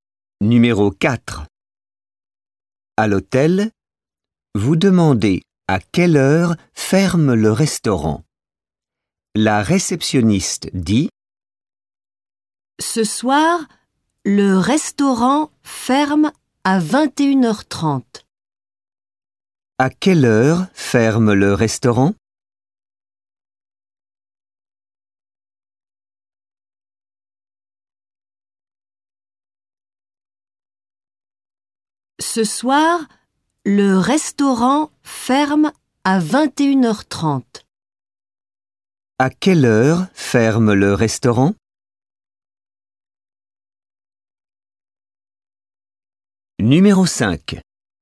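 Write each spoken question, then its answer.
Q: À quelle heure ferme le restaurant?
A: À 21h30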